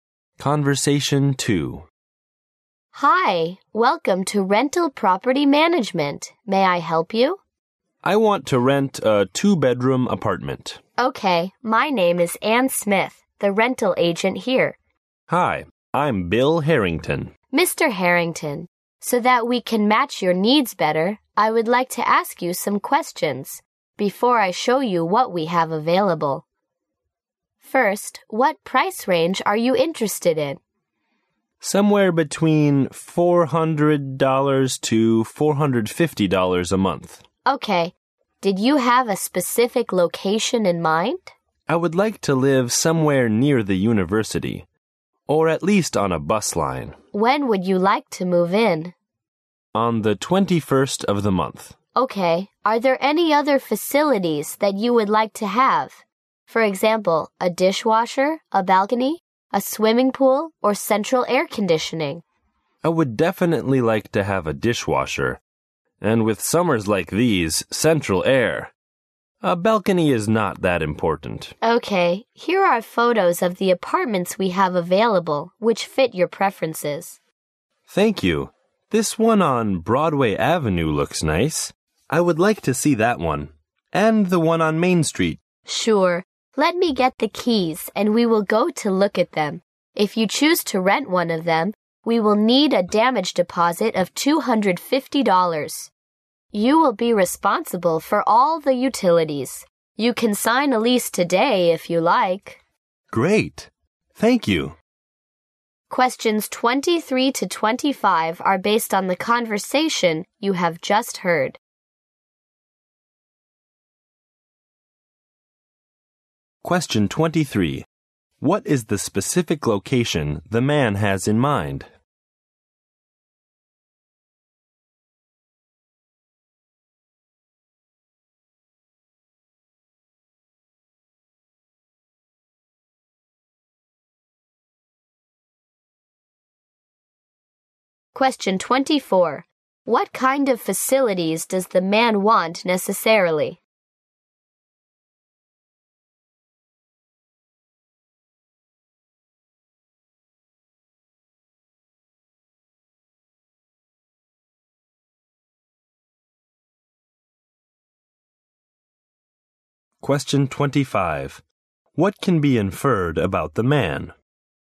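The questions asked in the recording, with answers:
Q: What is the specific location the man has in mind?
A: Near the university or on a bus line

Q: What kind of facilities does the man want necessarily?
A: A dishwasher and central air conditioning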